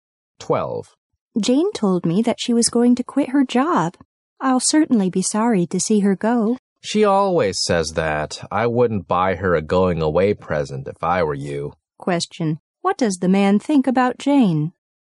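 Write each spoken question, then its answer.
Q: what does the man think about Jane?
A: She won't really quit her job; she always says that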